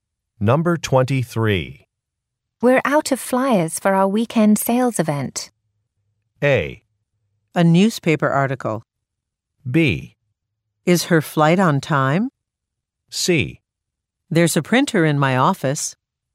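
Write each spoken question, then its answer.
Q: We're out of flyers for our weekend sales event.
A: C: There's a printer in my office.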